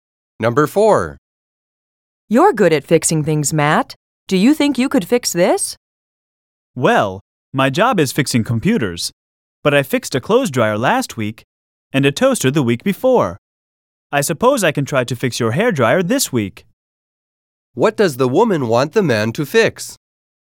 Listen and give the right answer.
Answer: The man says he is going to try to fix the woman's hair dryer for her.